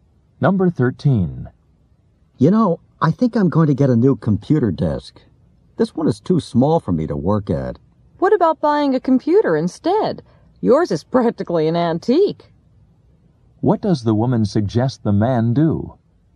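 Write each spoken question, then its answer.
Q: What does the woman suggest the man do?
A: Buy a new computer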